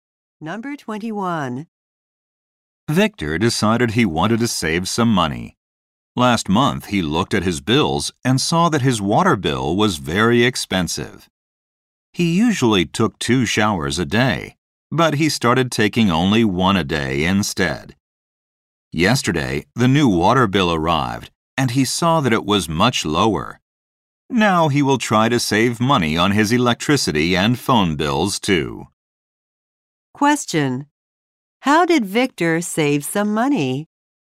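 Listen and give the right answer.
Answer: He took only one shower a day instead of two.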